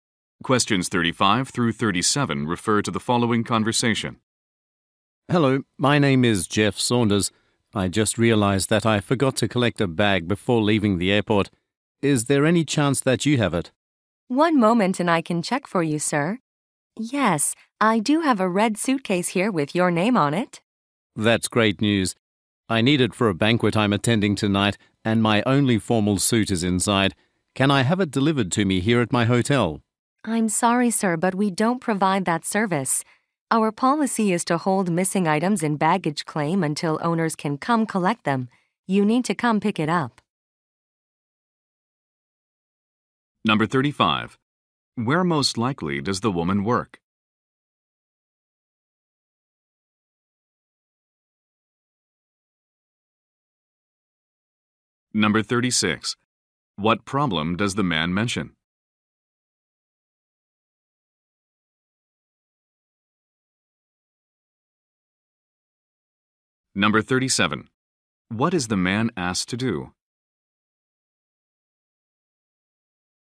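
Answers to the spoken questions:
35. At an airport baggage claim.
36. He forgot to collect his bag at the airport.
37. Come pick up the bag himself.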